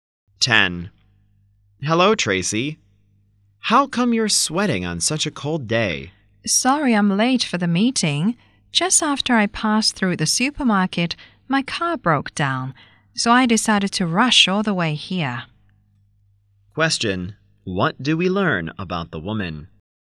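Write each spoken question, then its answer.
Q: What do we learn about the woman?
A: Her car broke down so she hurried to the meeting on foot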